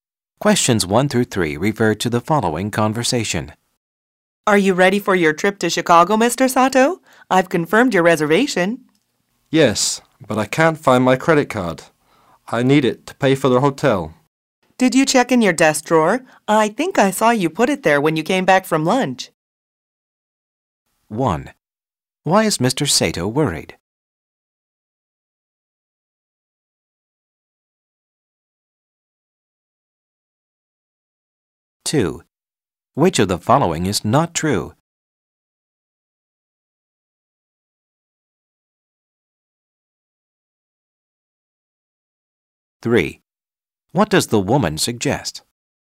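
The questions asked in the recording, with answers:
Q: Why is Mr. Sato worried?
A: He can't find his credit card

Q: What does the woman suggest?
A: Check his desk drawer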